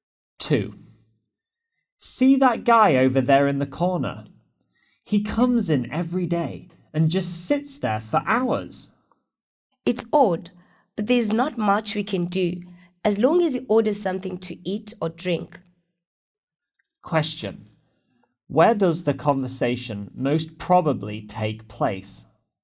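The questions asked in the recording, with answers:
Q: Where does the conversation most probably take place?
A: In a restaurant or café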